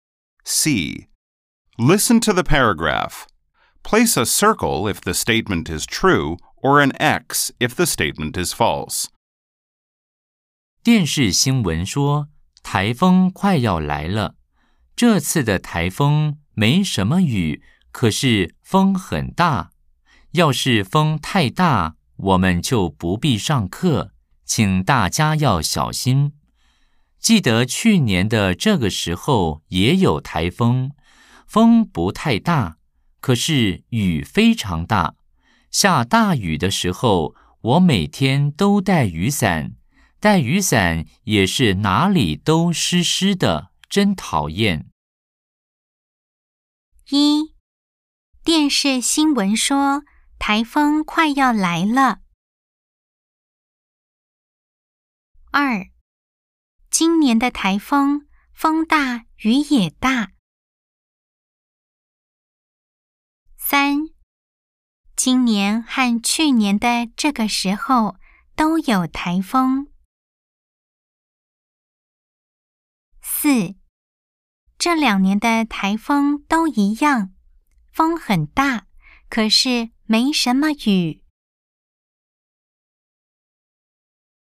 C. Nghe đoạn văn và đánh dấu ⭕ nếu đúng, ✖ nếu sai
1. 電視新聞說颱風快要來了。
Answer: O

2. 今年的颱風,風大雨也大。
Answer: X

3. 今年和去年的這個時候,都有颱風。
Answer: O

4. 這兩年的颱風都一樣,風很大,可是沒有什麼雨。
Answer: X